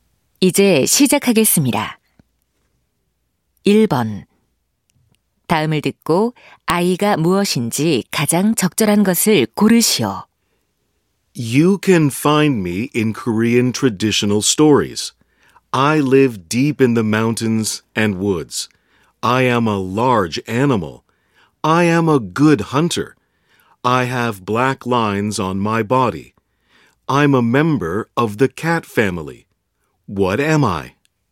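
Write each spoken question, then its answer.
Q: 다음을 듣고 아이가 무엇인지 가장 적절한 것을 고르시오.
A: 호랑이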